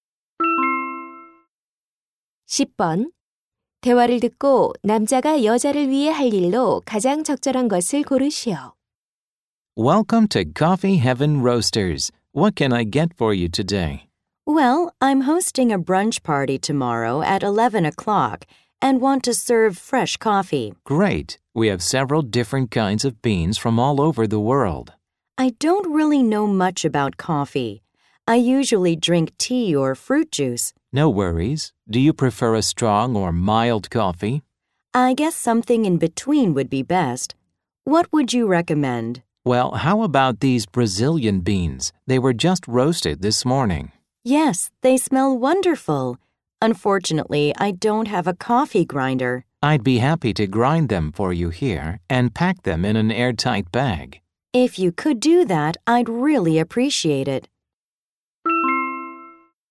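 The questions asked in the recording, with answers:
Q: 대화를 듣고 남자가 여자를 위해 할 일로 가장 적절한 것을 고르시오.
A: 커피콩을 갈아서 밀폐 봉지에 포장해 주기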